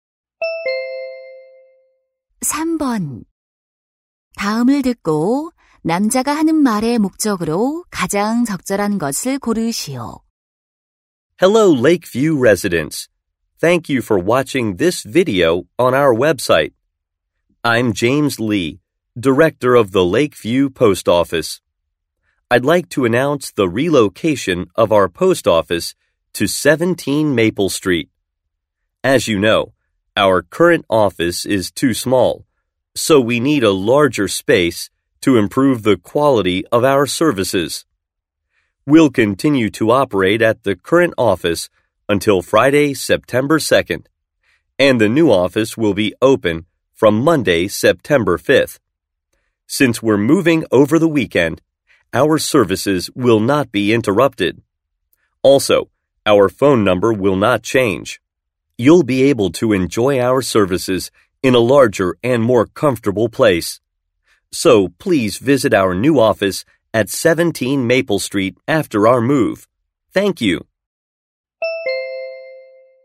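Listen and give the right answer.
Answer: 우체국 이전을 알리려고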